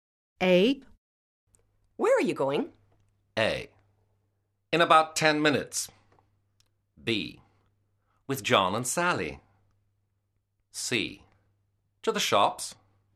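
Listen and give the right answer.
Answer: C: To the shops.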